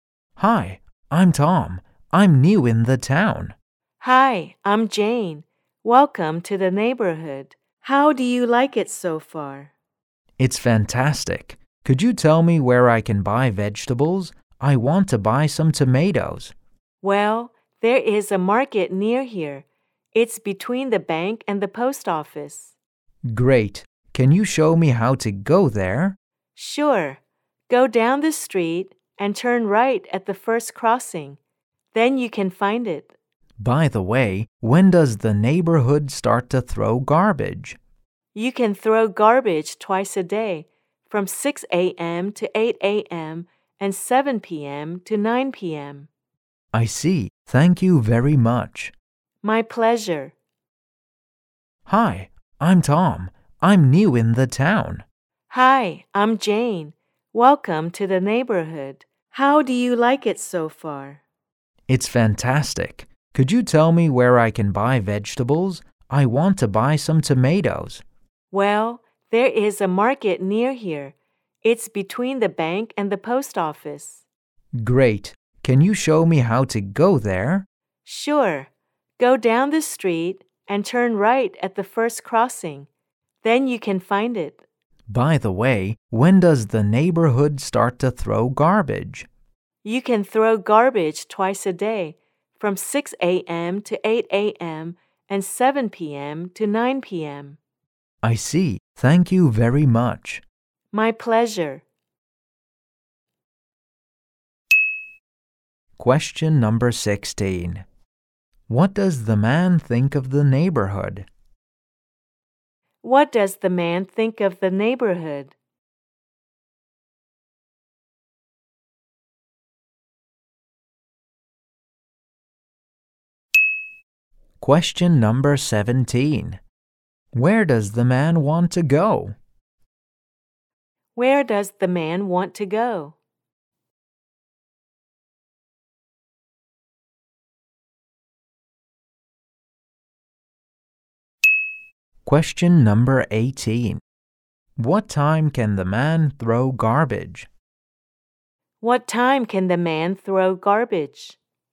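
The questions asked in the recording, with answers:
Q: What does the man think of the neighborhood?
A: It's fantastic

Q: Where does the man want to go?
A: To the market

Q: What time can the man throw garbage?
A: 6-8 a.m. and 7-9 p.m.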